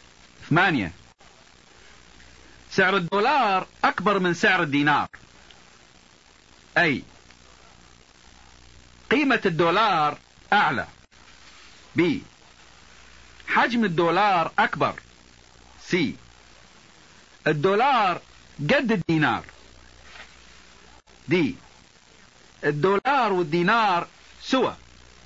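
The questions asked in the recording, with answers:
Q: ثمانية سعر الدولار أكبر من سعر الدينار.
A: A: قيمة الدولار أعلى.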